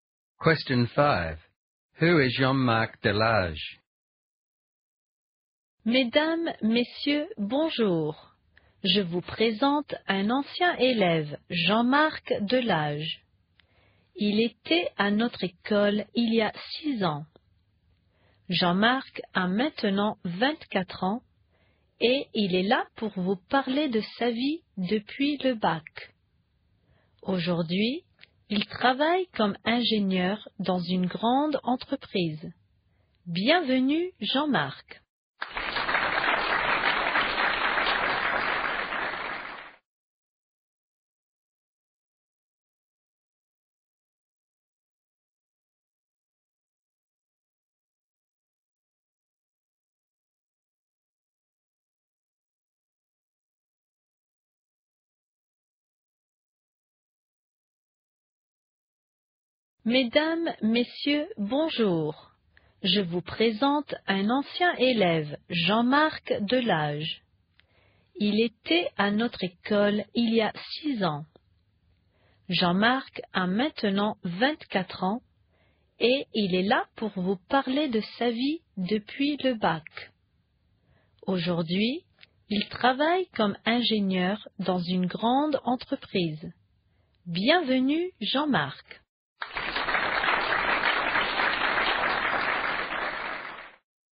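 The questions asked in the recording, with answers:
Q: Who is Jean-Marc Delage?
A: A former student of the school, now 24, working as an engineer in a large company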